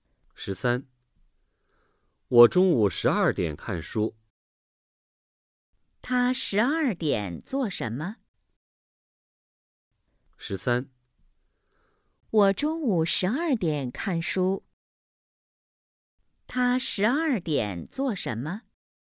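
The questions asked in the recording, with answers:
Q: 他12点做什么?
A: 看书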